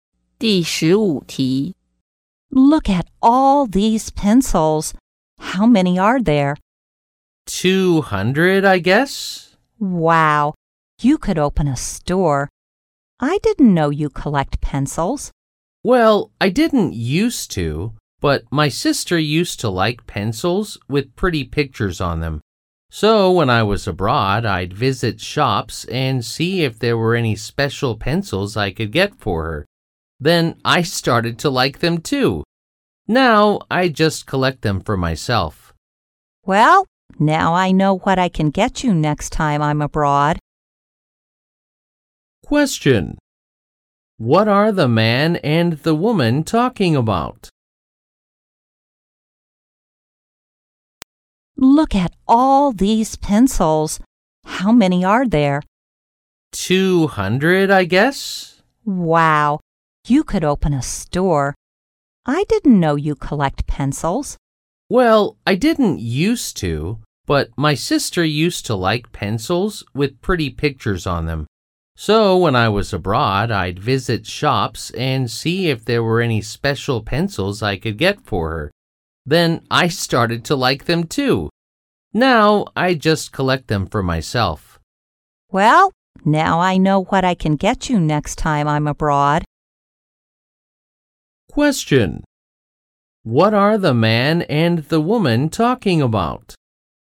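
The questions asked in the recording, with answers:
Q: What are the man and the woman talking about?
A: The man's pencil collection.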